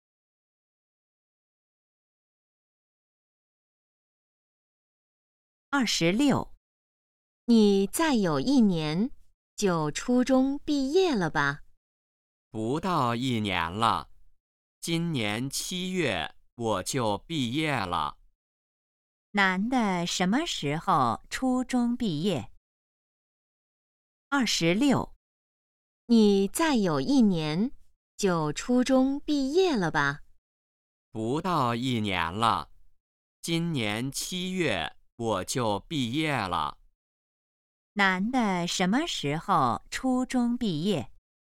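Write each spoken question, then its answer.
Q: 男的什么时候初中毕业?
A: 今年七月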